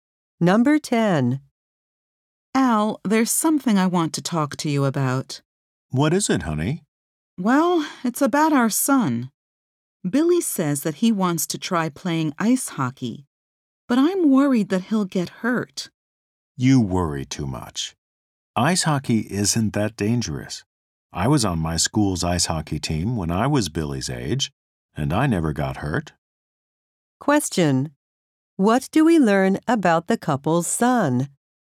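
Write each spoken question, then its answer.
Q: What do we learn about the couple's son?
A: He wants to try playing ice hockey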